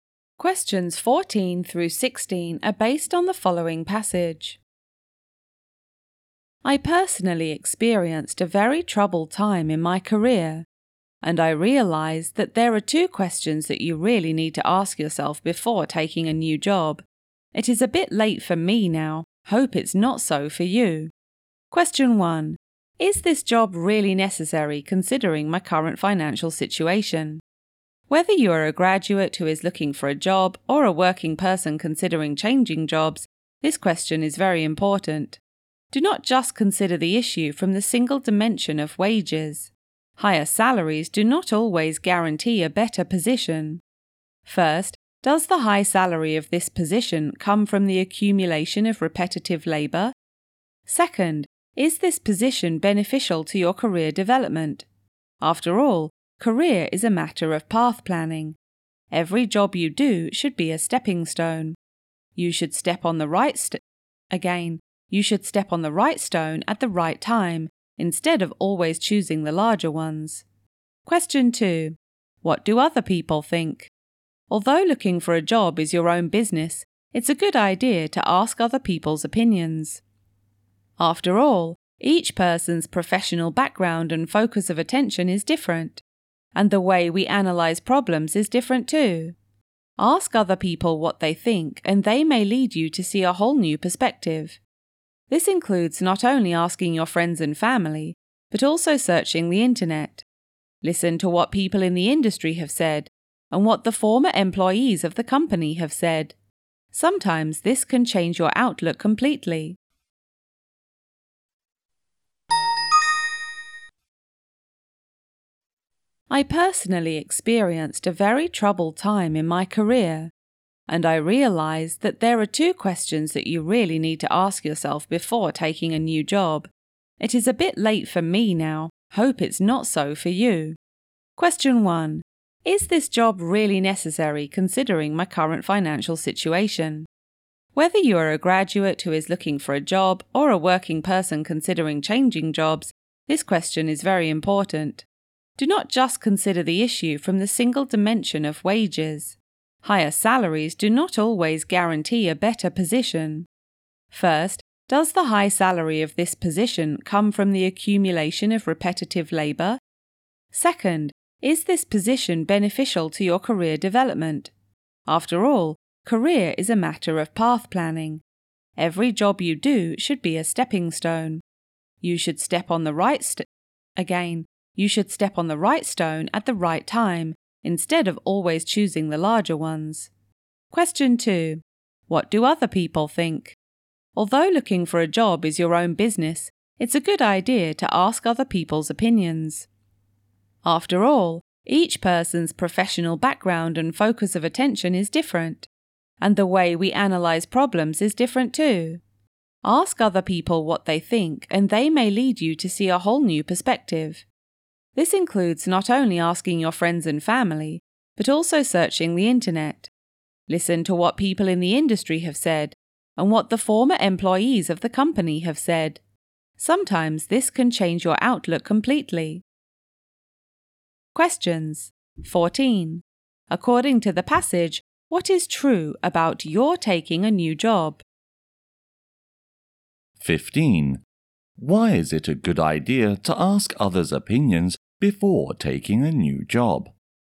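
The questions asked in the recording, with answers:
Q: 15. Why is it a good idea to ask others' opinions before taking a new job?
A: They may help you see a whole new perspective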